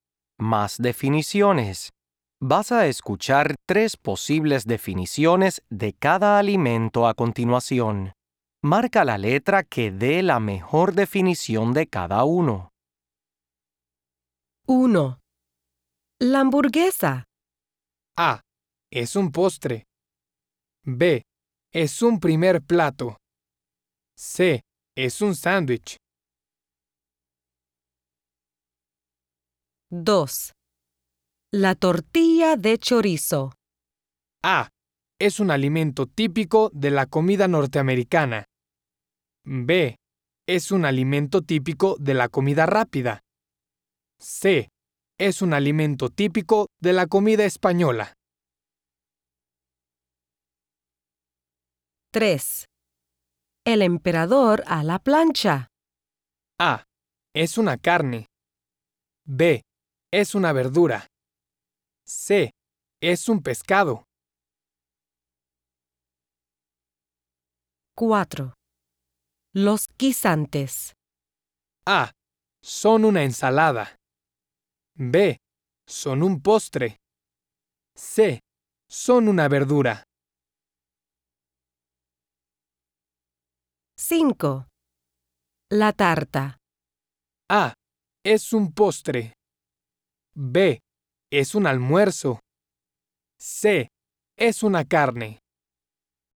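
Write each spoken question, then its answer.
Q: La hamburguesa.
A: C: Es un sándwich.

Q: La tortilla de chorizo.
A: C: Es un alimento típico de la comida española.

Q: El emperador a la plancha.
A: C: Es un pescado.

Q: Los guisantes.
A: C: Son una verdura.

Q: La tarta.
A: A: Es un postre.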